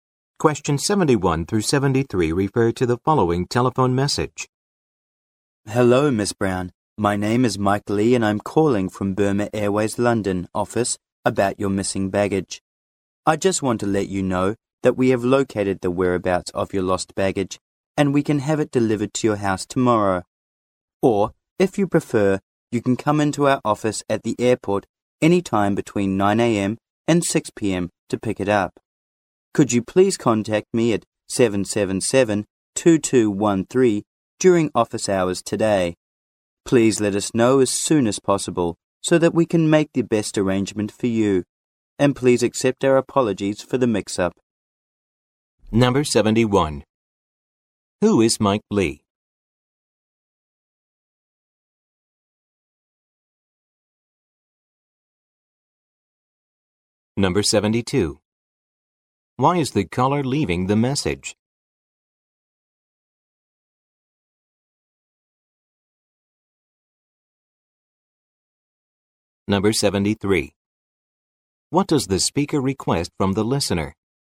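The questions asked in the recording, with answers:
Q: Who is Mike Lee?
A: An airline employee

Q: Why is the caller leaving the message?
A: Her lost baggage has been found

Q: What does the speaker request from the listener?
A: Call him back during office hours today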